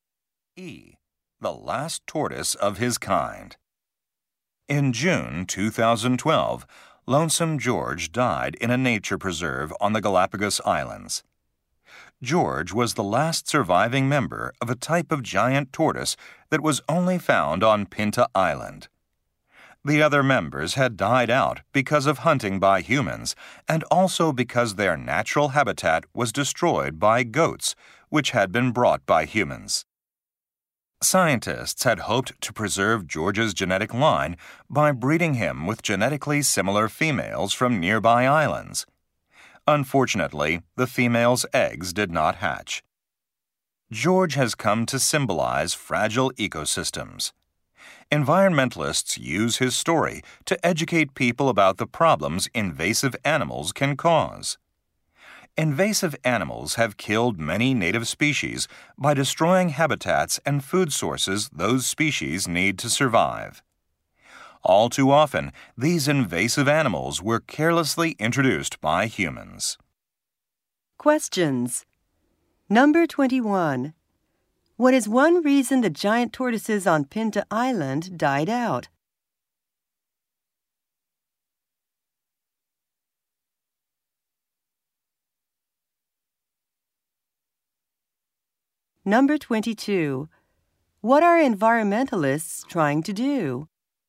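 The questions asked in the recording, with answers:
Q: What is one reason the giant tortoises on Pinta Island died out?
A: People hunted them, and goats brought in by people destroyed their habitat.

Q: What are environmentalists trying to do?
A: Teach people about the problems that invasive animals cause.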